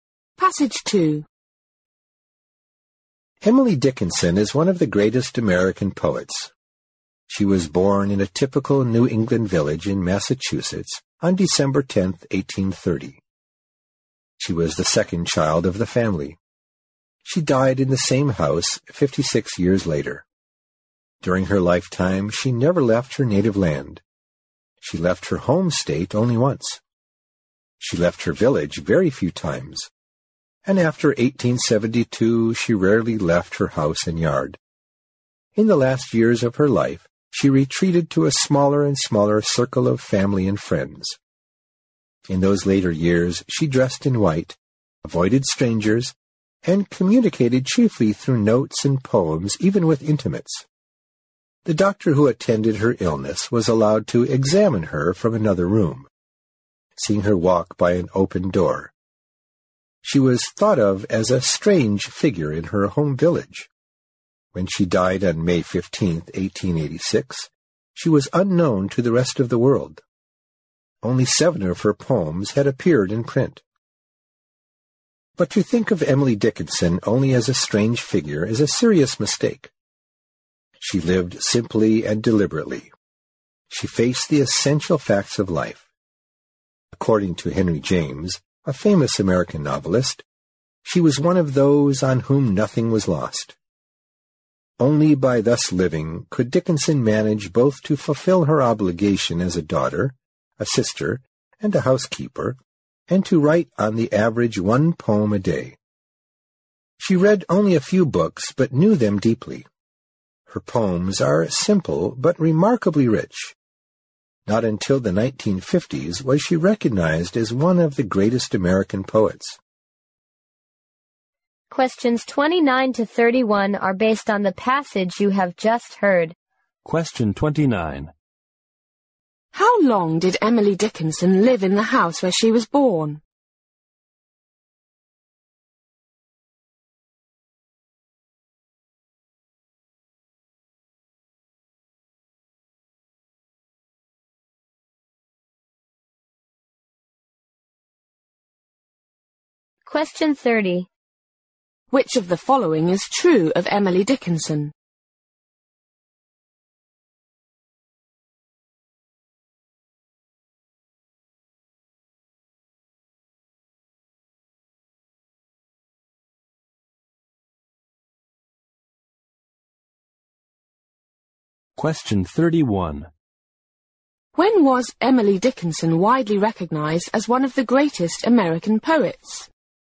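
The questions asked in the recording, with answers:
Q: How long did Emily Dickinson live in the house where she was born?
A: 56 years

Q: When was Emily Dickinson widely recognized as one of the greatest American poets?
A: In the 1950s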